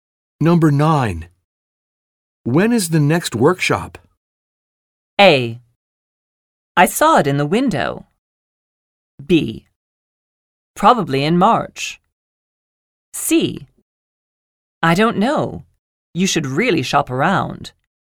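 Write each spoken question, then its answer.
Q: When is the next workshop?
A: B: Probably in March.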